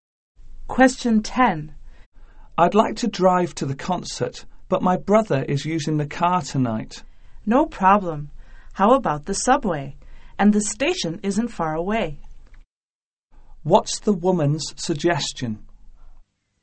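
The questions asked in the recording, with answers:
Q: What's the woman's suggestion?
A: Take the subway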